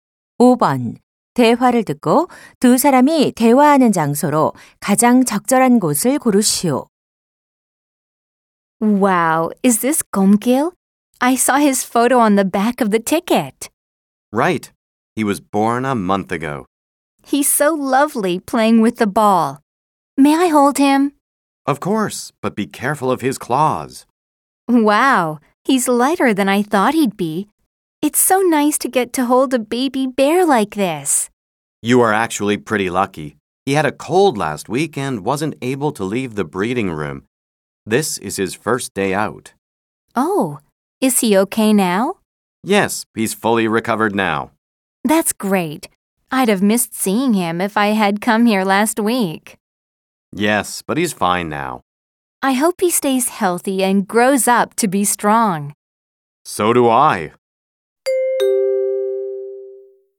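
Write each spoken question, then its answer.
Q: 대화를 듣고 두 사람이 대화하는 장소로 가장 적절한 곳을 고르시오.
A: 동물원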